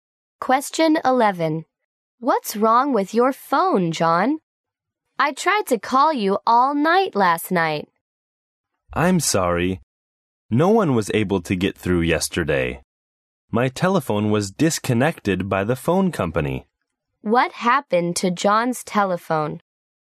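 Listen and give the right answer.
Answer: The phone company disconnected it.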